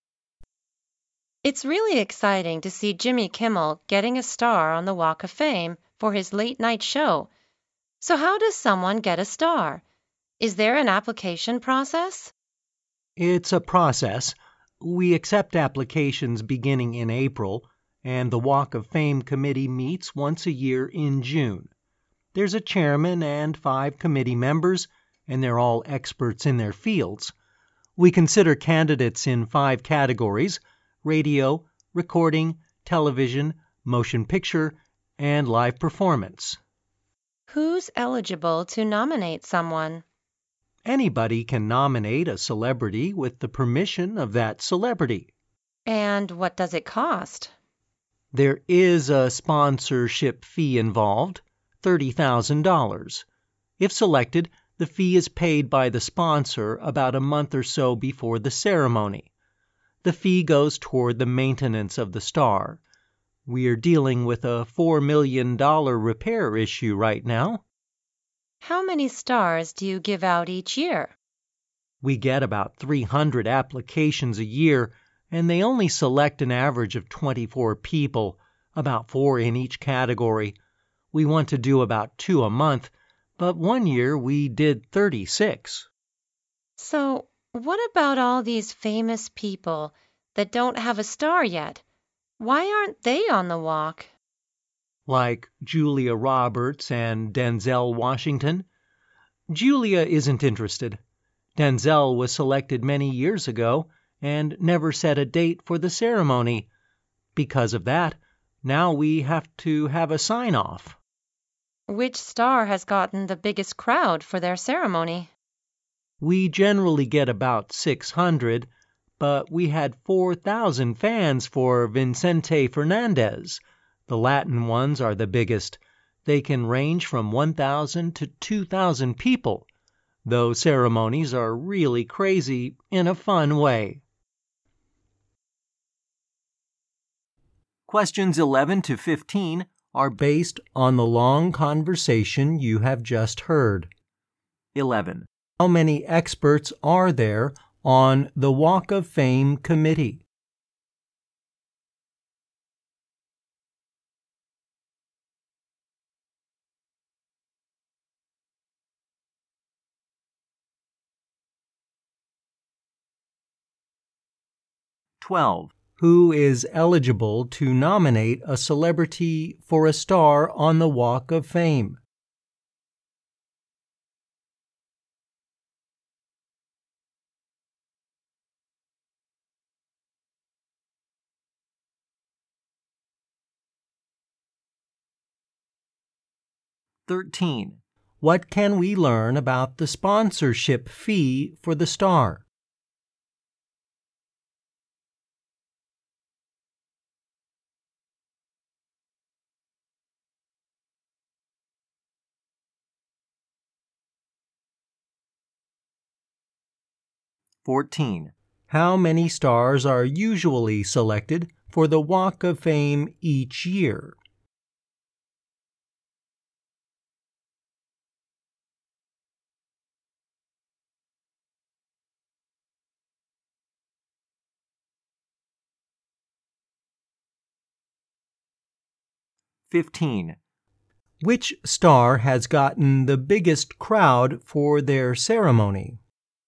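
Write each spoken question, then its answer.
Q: Who is eligible to nominate a celebrity for a star on the Walk of Fame?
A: Anybody, with the celebrity's permission

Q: What can we learn about the sponsorship fee for the star?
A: It is $30,000 and goes toward maintaining the star

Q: How many stars are usually selected for the Walk of Fame each year?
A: About 24

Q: Which star has gotten the biggest crowd for their ceremony?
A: Vicente Fernandez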